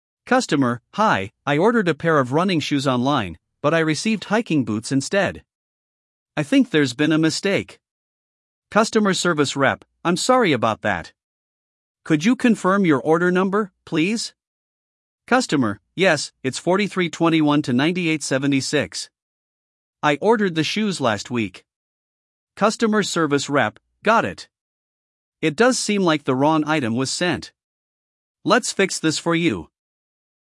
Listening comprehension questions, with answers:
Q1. What item did the customer order?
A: Running shoes

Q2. What item did the customer receive instead?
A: Hiking boots

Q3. What is the order number?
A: 4321-9876

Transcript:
Customer: Hi, I ordered a pair of running shoes online, but I received hiking boots instead. I think there's been a mistake.
Customer Service Rep: I'm sorry about that! Could you confirm your order number, please?
Customer: Yes, it's 4321-9876. I ordered the shoes last week.
Customer Service Rep: Got it. It does seem like the wrong item was sent. Let's fix this for you.